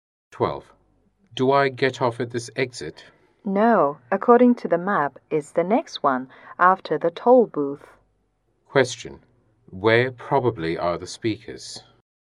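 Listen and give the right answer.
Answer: In a car on a highway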